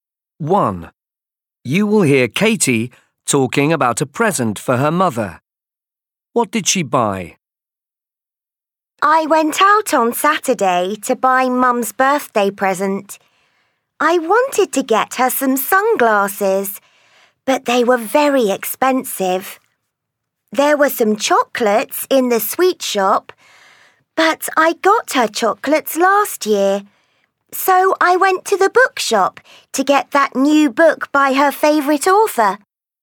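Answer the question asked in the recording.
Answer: a book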